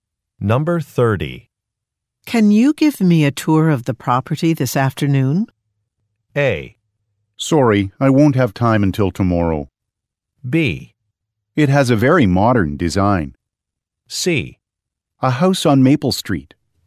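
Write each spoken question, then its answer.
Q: Can you give me a tour of the property this afternoon?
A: A: Sorry, I won't have time until tomorrow.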